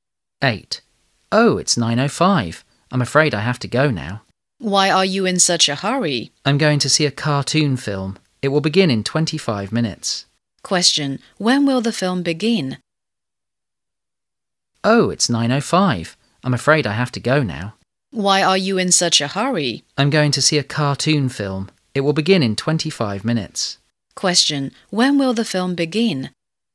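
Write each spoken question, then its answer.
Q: Question. When will the film begin?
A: At 9:30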